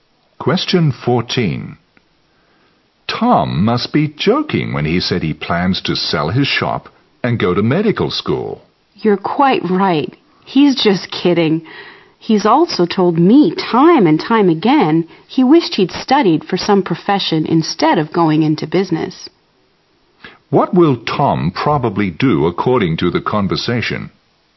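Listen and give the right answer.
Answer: Sell his shop and study medicine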